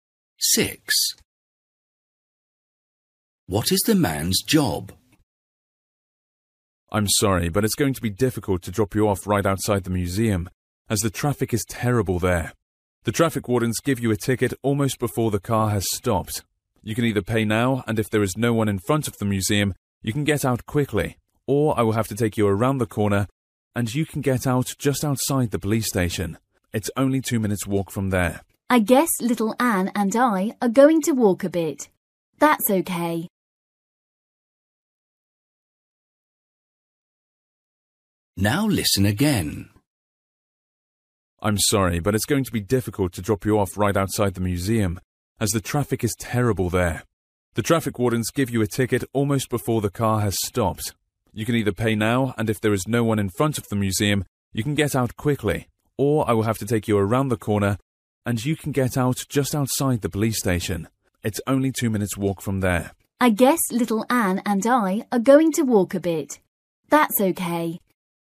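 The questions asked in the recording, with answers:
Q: What is the man's job?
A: Taxi driver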